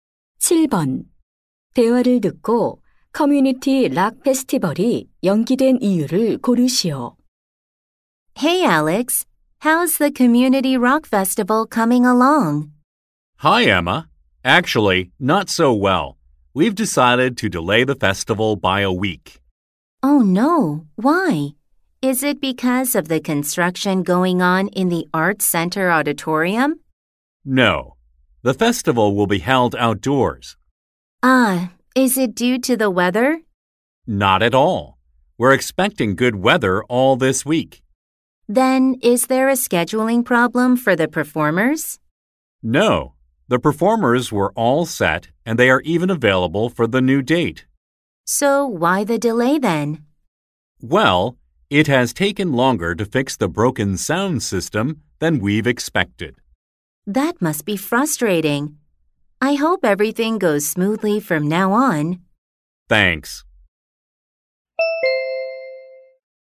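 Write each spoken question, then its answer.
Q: 대화를 듣고 커뮤니티 락 페스티벌이 연기된 이유를 고르시오.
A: 고장 난 음향 시스템 수리가 예상보다 오래 걸려서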